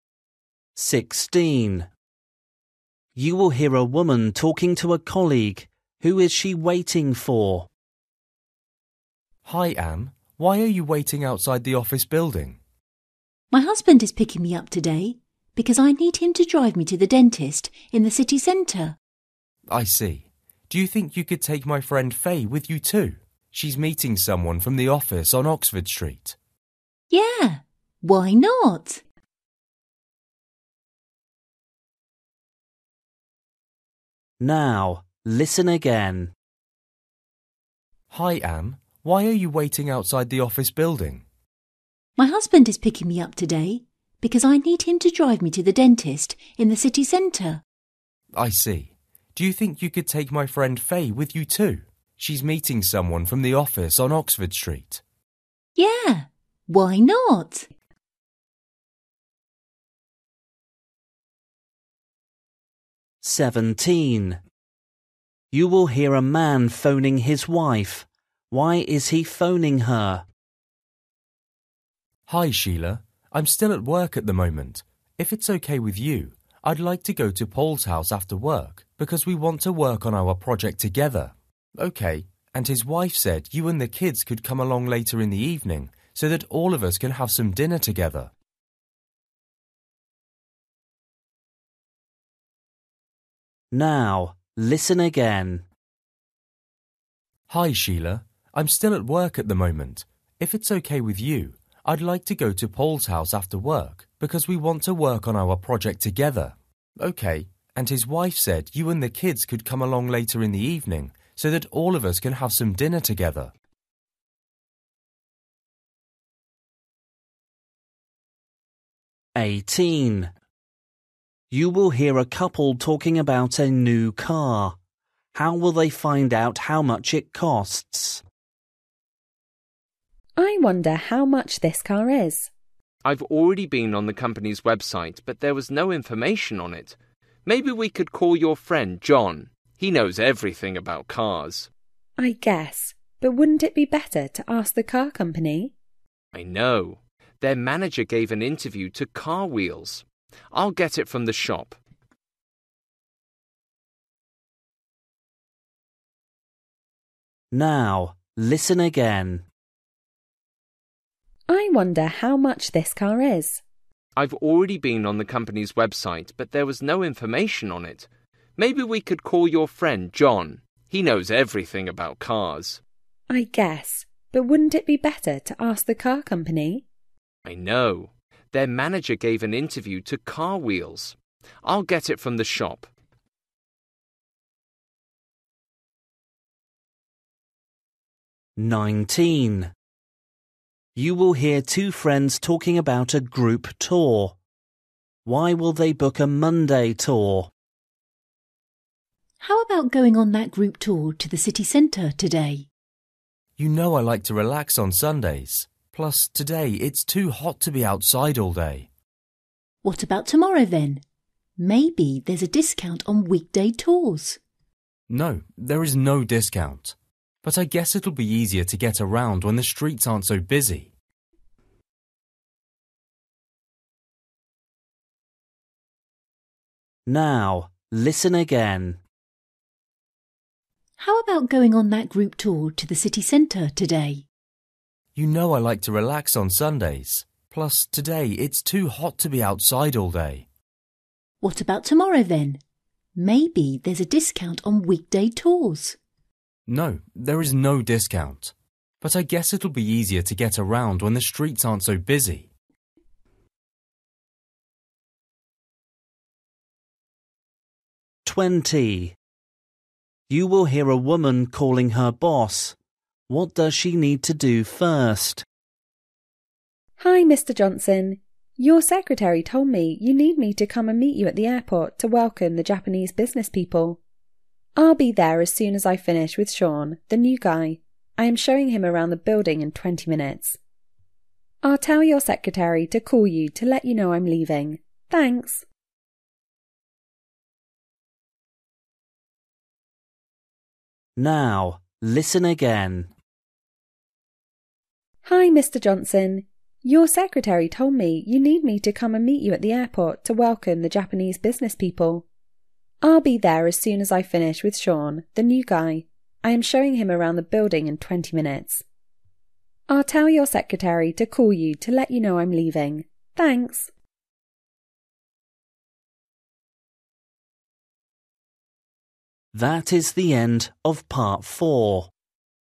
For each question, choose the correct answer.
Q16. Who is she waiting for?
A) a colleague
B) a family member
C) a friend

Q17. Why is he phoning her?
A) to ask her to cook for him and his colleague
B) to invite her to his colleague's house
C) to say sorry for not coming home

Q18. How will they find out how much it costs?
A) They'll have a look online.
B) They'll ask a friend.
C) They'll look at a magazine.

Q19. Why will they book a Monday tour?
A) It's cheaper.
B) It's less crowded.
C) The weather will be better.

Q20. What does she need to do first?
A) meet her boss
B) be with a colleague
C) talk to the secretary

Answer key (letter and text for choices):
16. B) a family member
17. B) to invite her to his colleague's house
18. C) They'll look at a magazine.
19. B) It's less crowded.
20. B) be with a colleague

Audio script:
16 You will hear a woman talking to a colleague. Who is she waiting for?
M: Hi Ann, why are you waiting outside the office building?
F: My husband is picking me up today because I need him to drive me to the dentist in the city centre.
M: I see. Do you think you could take my friend Fay with you, too? She's meeting someone from the office in Oxford Street.
F: Yeah, why not?
17 You will hear a man phoning his wife. Why is he phoning her?
M: Hi Sheila. I'm still at work at the moment. If it's ok with you, I'd like to go to Paul's house after work because we want to work on our project together. (17) And his wife said you and the kids could come along later in the evening so that all of us can have some dinner together.
18 You will hear a couple talking about a new car.
F: I wonder how much this car is.
M: I've already been on the company's website but there was no information on it. Maybe we could call your friend John. He knows everything about cars.
F: I guess but wouldn't it be better to ask the car company?
M: I know... Their manager gave an interview to "Car Wheels". I'll get it from the shop.
19 You will hear two friends talking about a group tour.
F: How about going on that group tour to the city centre today?
M: You know I like to relax on Sundays. Plus today it's too hot to be outside all day.
F: What about tomorrow then? Maybe there's a discount on weekday tours.
M: No, there is no discount, but I guess it'll be easier to get around when the streets aren't so busy.
20 You will hear a woman calling her boss. What does she need to do first?
F: Hi Mr Johnson. Your secretary told me you need me to come and meet you at the airport to welcome the Japanese business people. I'll be there as soon as I finish with Sean, the new guy. I am showing him around the building in 20 minutes. I'll tell your secretary to call you to let you know I'm leaving. Thanks.

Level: KET (A2)